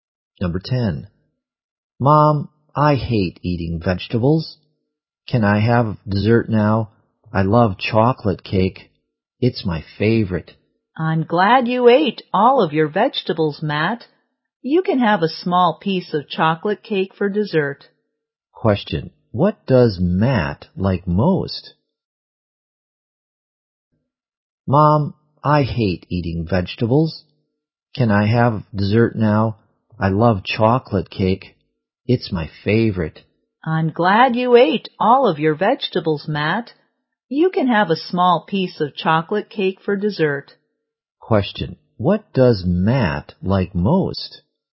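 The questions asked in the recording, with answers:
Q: Question. What does Matt like most?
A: Chocolate cake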